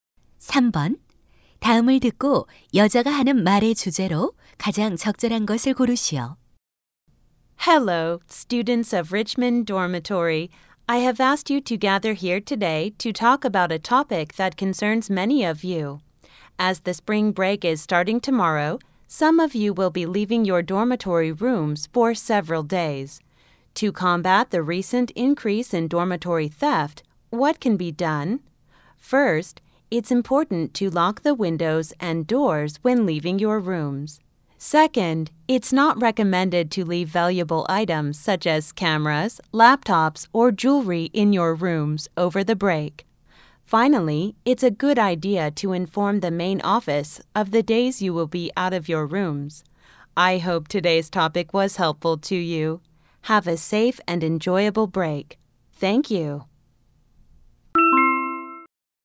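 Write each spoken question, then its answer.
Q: 다음을 듣고 여자가 하는 말의 주제로 가장 적절한 것을 고르시오.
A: 방학 동안 기숙사 도난을 막는 방법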